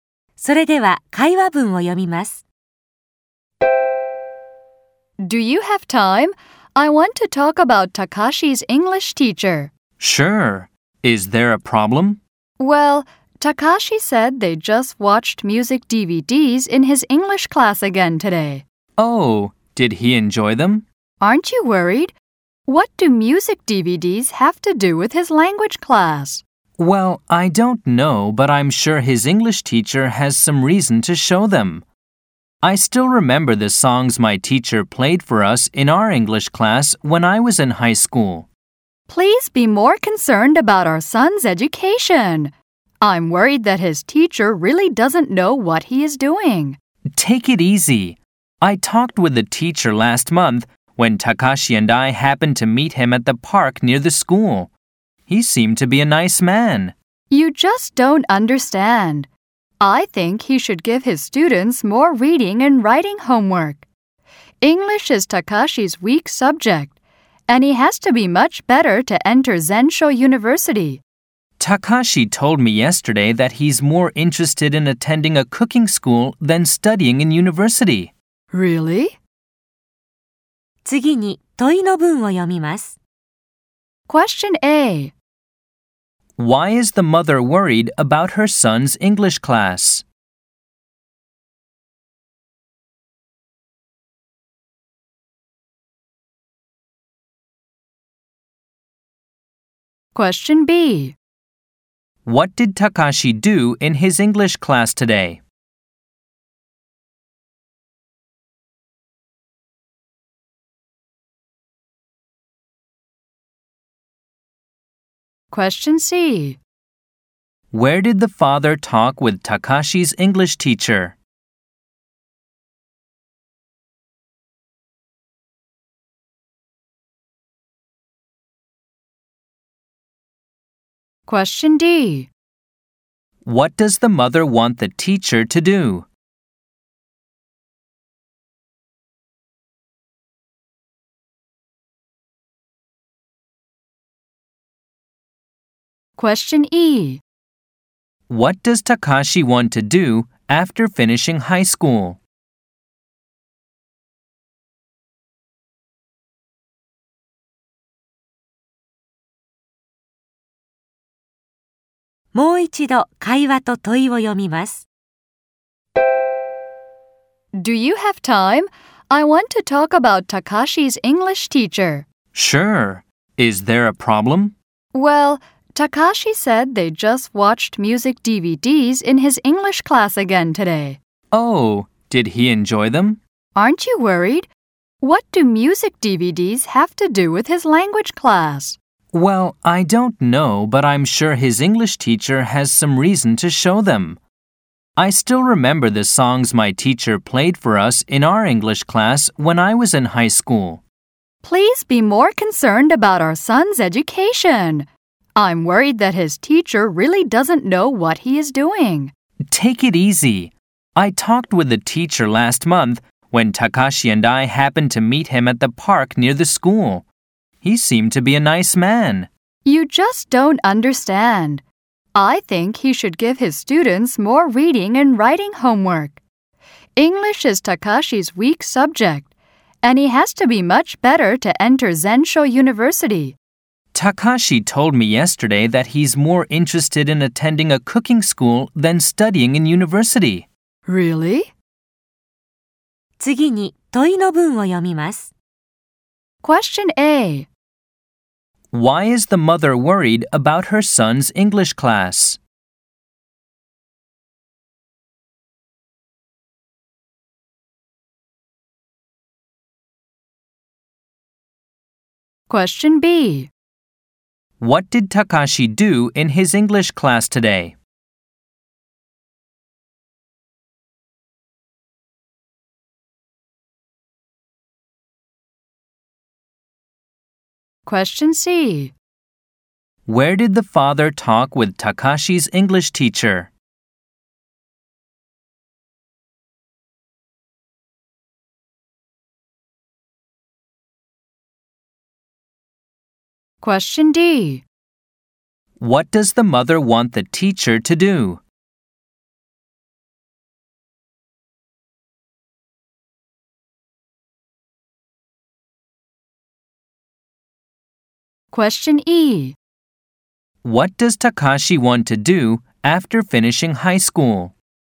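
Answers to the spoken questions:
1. They just watch music DVDs, and she thinks the teacher doesn't know what he is doing.
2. He watched music DVDs.
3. At the park near the school.
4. Give more reading and writing homework.
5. Go to a cooking school.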